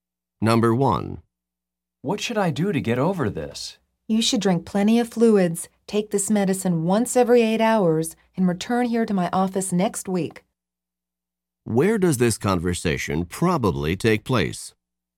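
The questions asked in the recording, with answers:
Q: Where does this conversation probably take place?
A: In a doctor's office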